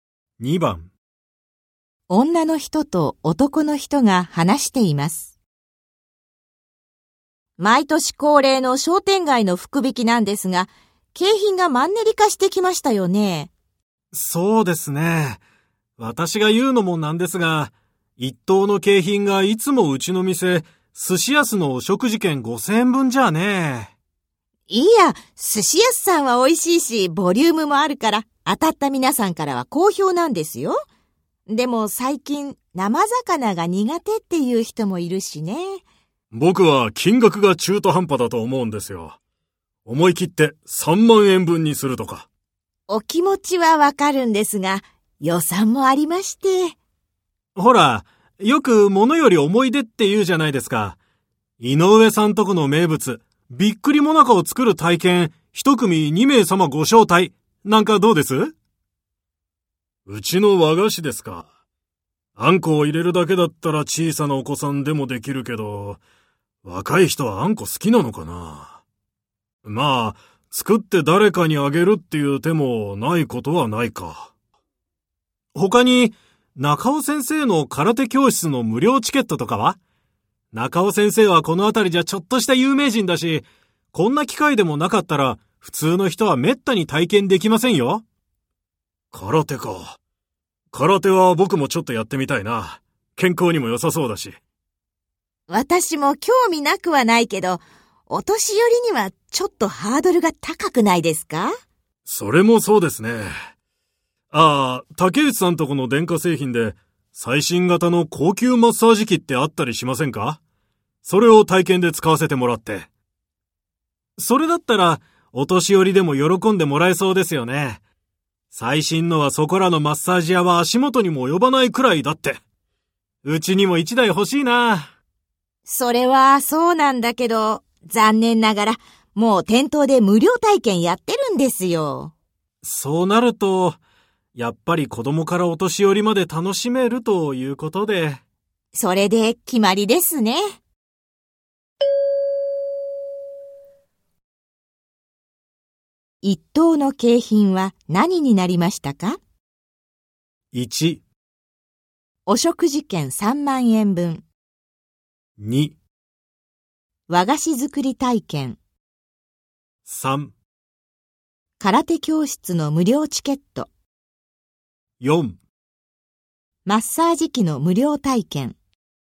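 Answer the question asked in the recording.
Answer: 2: 和菓子作り体験。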